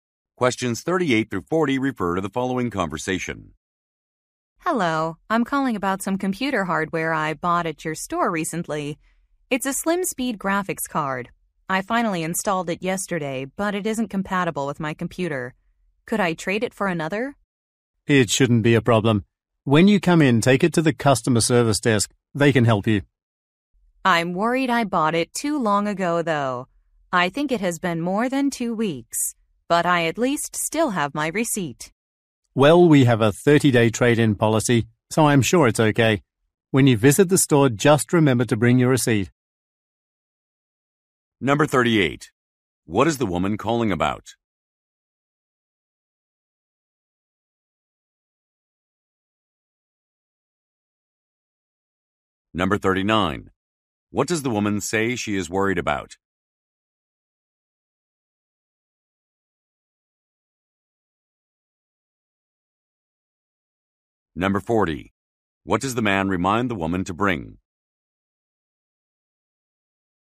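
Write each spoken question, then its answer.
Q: What is the woman calling about?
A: Exchanging a graphics card that isn't compatible

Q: What does the woman say she is worried about?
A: She bought it too long ago

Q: What does the man remind the woman to bring?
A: Her receipt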